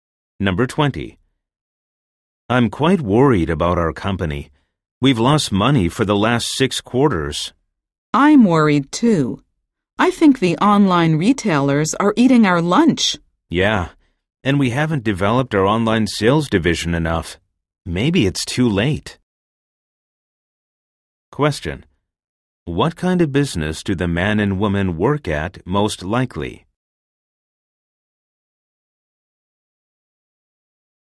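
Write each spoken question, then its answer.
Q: What kind of business do the man and woman work at most likely?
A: A retail store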